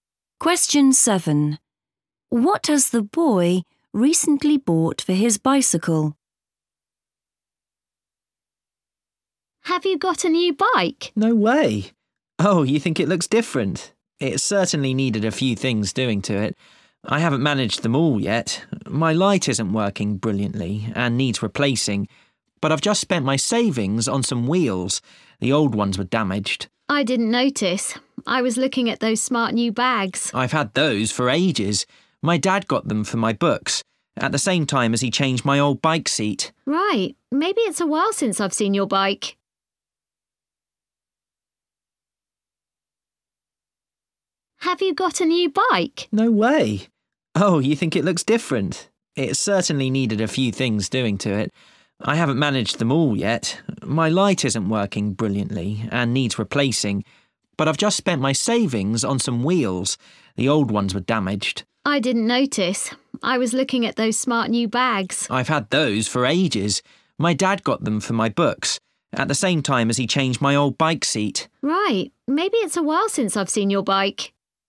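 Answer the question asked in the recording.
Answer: wheels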